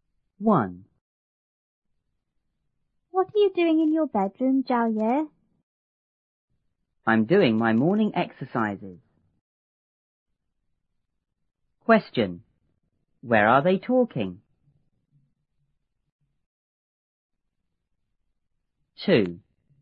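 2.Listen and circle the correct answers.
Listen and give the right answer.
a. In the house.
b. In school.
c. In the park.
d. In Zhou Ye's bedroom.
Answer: d. In Zhou Ye's bedroom.

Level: 初中英语广州版1B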